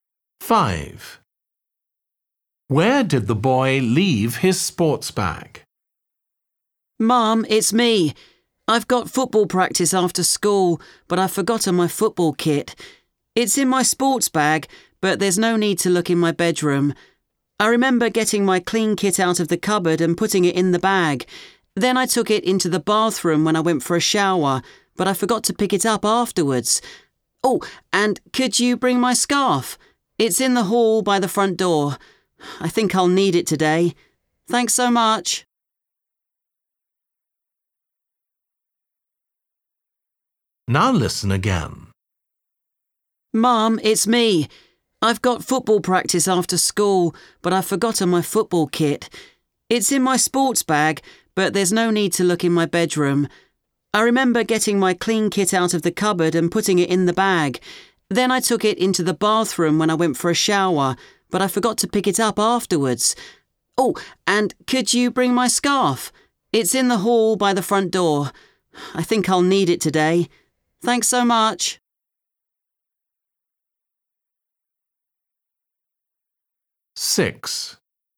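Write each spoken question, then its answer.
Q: Where did the boy leave his sports bag?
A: in the bathroom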